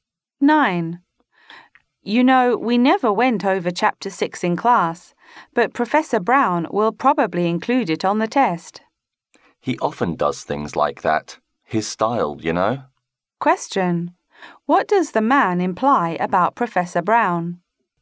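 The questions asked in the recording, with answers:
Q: What does the man imply about Professor Brown?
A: He often tests material not covered in class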